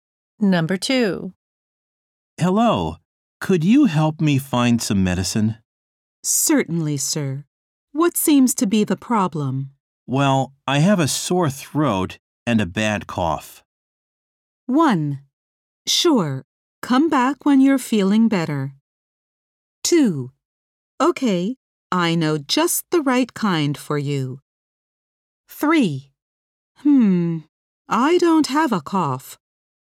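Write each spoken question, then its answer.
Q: Well, I have a sore throat and a bad cough.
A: 2: Okay, I know just the right kind for you.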